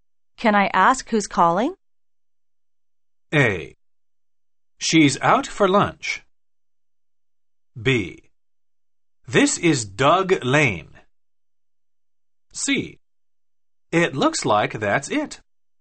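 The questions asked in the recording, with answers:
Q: Can I ask who's calling?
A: B: This is Doug Lane.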